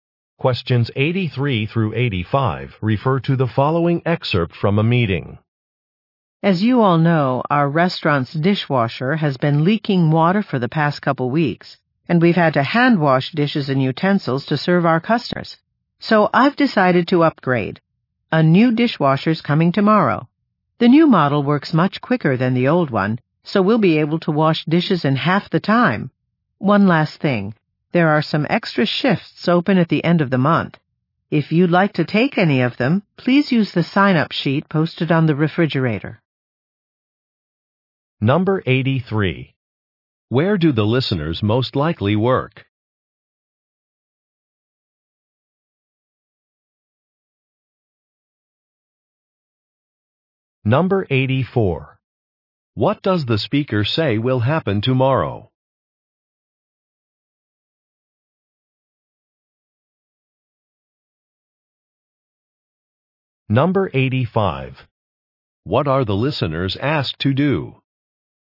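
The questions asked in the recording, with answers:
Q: Where do the listeners most likely work?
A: At a restaurant

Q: What does the speaker say will happen tomorrow?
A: A new dishwasher will arrive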